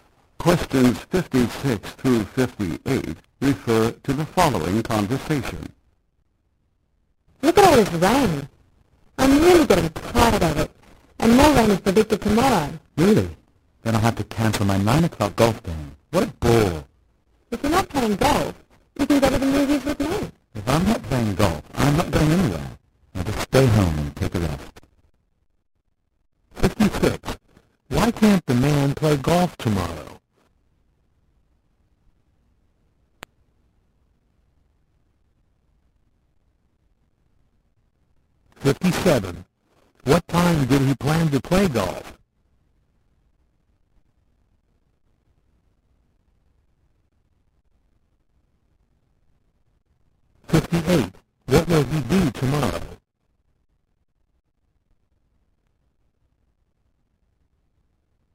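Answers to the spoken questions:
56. Because of the rain
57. 9 o'clock
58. Stay home and rest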